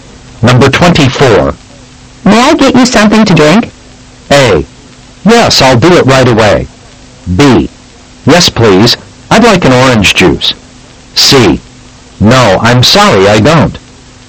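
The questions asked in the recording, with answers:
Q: May I get you something to drink?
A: B: Yes, please. I'd like an orange juice.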